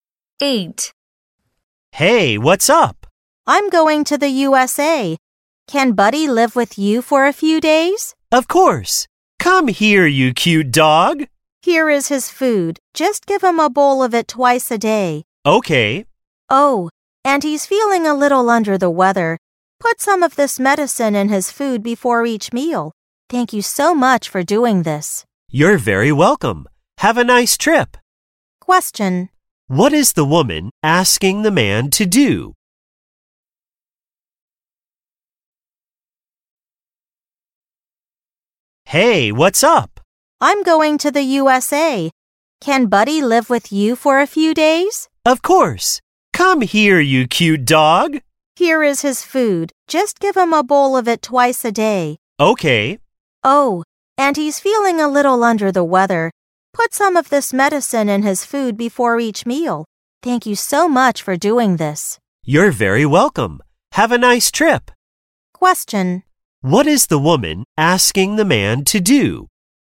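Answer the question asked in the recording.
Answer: Take care of her dog Buddy for a few days.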